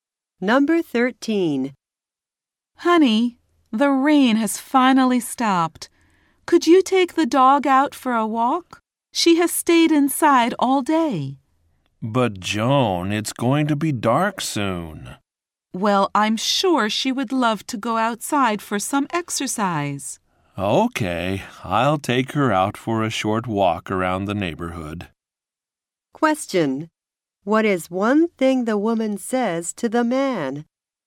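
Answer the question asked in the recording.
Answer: The dog has stayed inside all day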